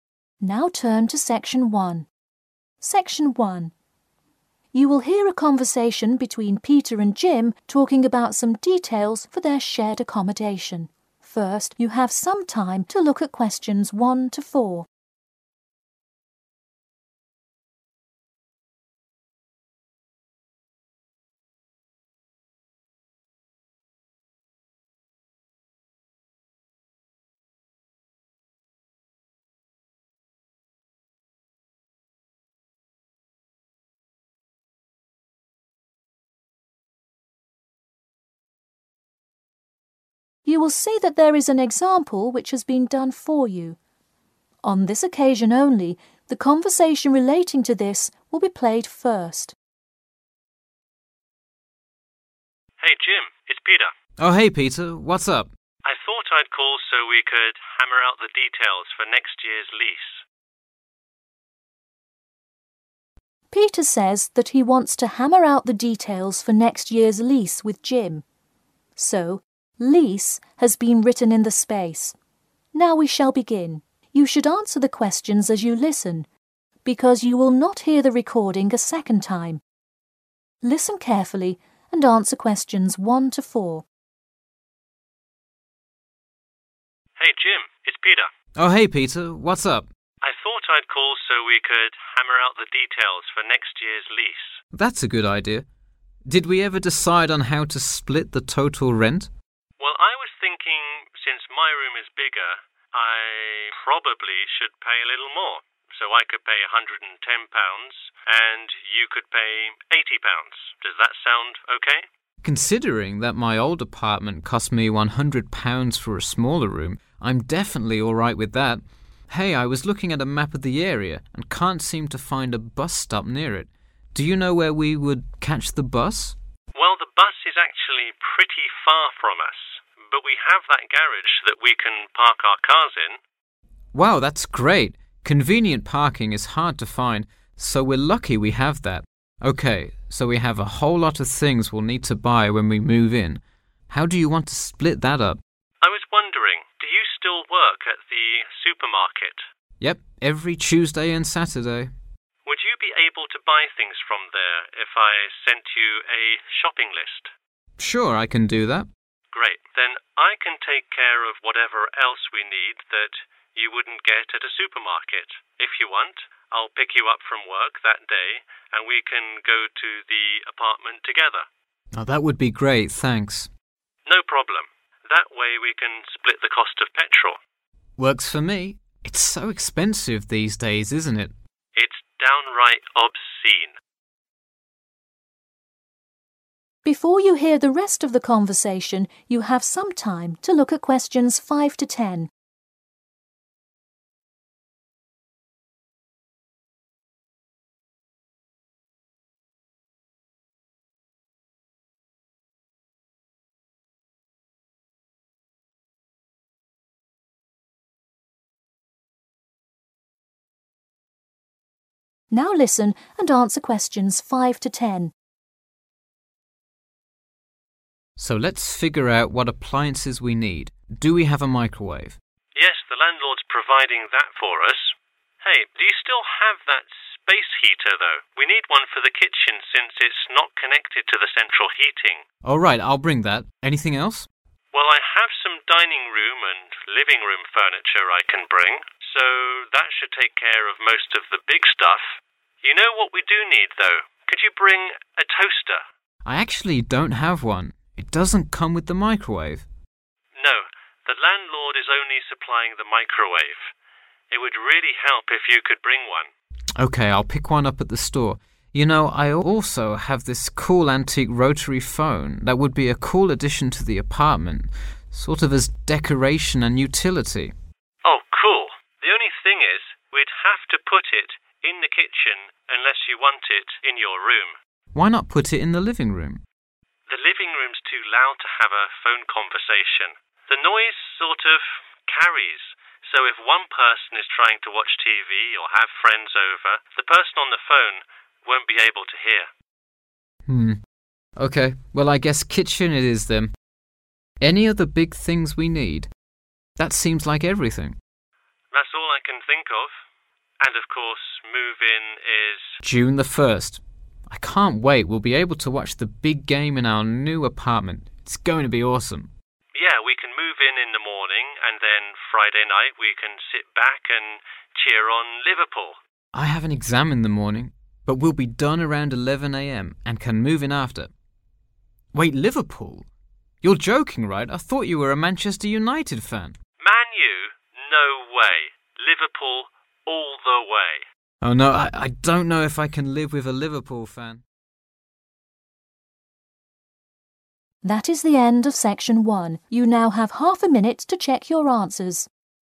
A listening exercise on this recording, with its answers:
Complete the notes below. Write NO MORE THAN TWO WORDS AND/OR A NUMBER for each answer.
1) The total rent: Peter £ 110 & Jim £ 1..............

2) Car parking: in the 2..............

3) A place to buy things: 3.............., because Jim works there.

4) The fees they should share: 4.............. fees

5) The 5.............. is needed in the kitchen.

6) Jim will buy a 6.............. at the store.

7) Location of the telephone: in the 7..............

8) Move-in date: 8..............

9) Watching the game together: on 9..............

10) What Jim needs to do before move-in: take 10.............. in the morning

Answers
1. 80
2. garage
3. (the) supermarket
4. petrol
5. space heater
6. toaster
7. kitchen
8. 1 June/ June 1 (st)
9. Friday evening / night
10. (an) exam